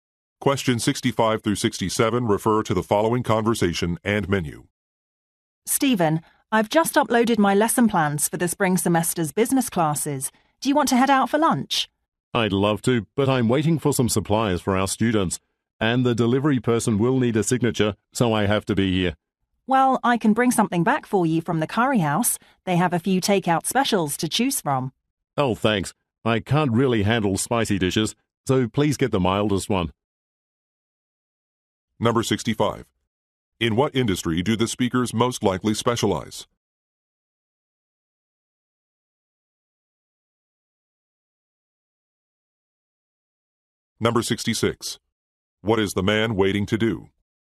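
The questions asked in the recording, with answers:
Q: In what industry do the speakers most likely specialize?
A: Education

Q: What is the man waiting to do?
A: Sign for a supply delivery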